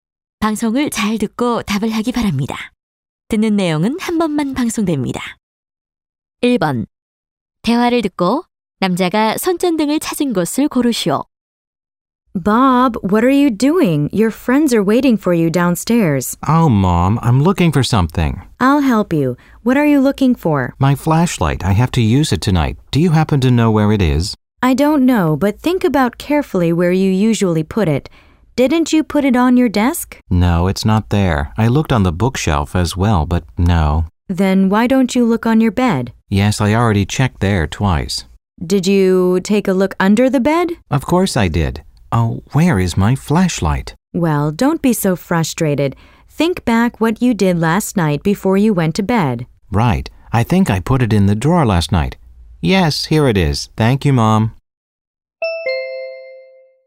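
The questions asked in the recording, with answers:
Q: 대화를 듣고 남자가 손전등을 찾은 곳을 고르시오.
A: 서랍 안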